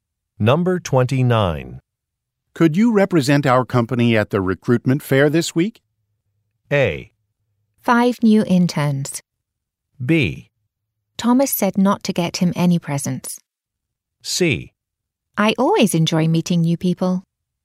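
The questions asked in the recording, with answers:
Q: Could you represent our company at the recruitment fair this week?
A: C: I always enjoy meeting new people.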